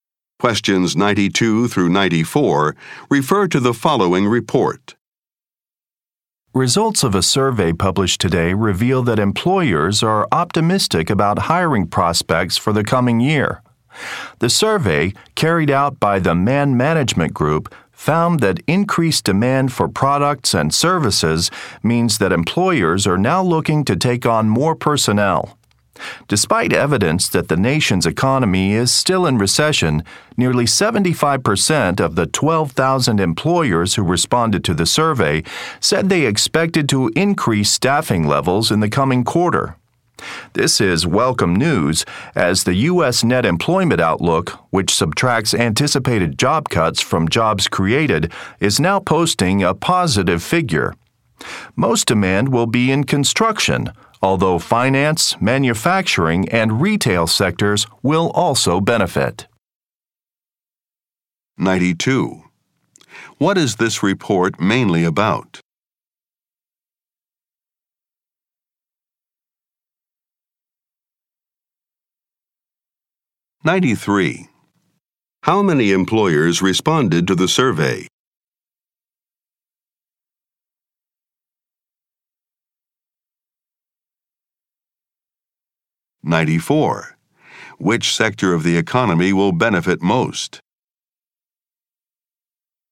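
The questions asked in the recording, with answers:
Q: What is this report mainly about?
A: Employers expect to hire more staff

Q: How many employers responded to the survey?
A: 12,000

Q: Which sector of the economy will benefit most?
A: Construction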